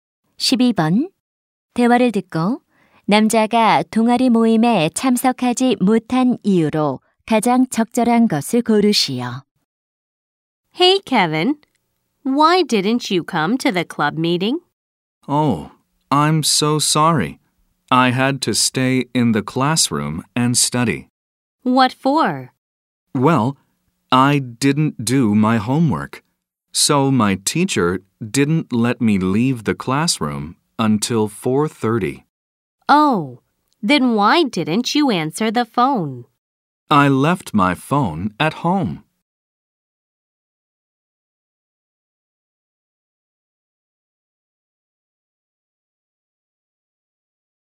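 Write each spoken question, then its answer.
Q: 대화를 듣고 남자가 동아리 모임에 참석하지 못한 이유로 가장 적절한 것을 고르시오.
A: 숙제를 안 해서 교실에 남아야 했기 때문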